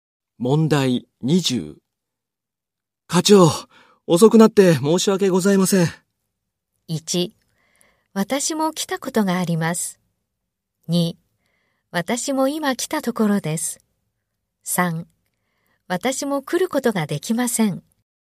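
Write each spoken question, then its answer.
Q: 課長、遅くなって申し訳ございません。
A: 2: 私も今来たところです。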